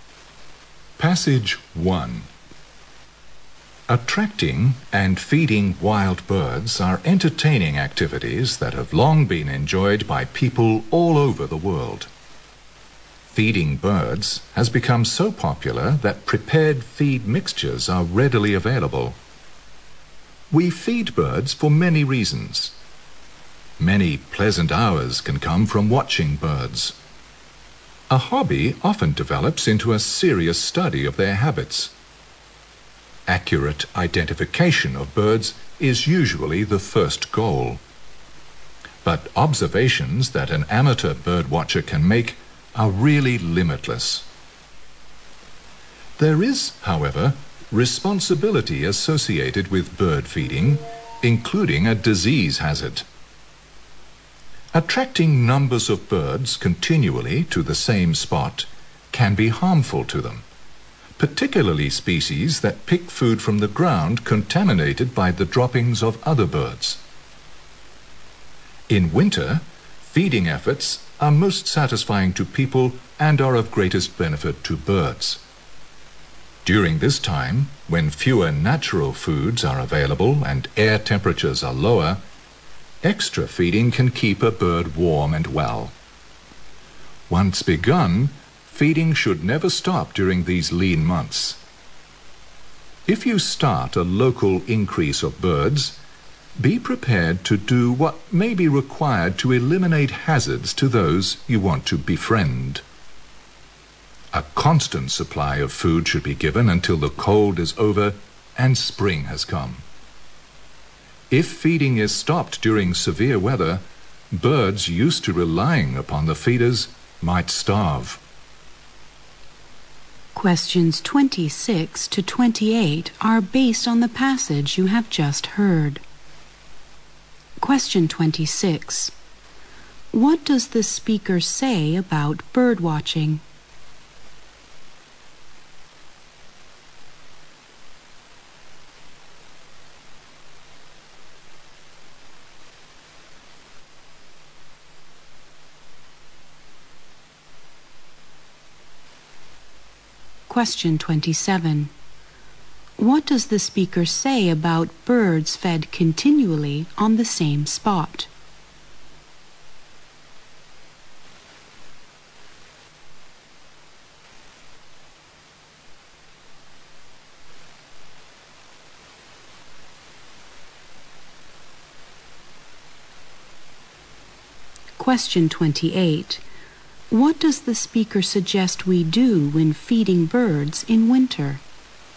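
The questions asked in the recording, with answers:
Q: What does the speaker say about bird watching?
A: It can turn into a serious study of birds' habits.

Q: What does the speaker say about birds fed continually on the same spot?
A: They may catch diseases.

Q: What does the speaker suggest we do when feeding birds in winter?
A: Keep a constant supply of food until spring.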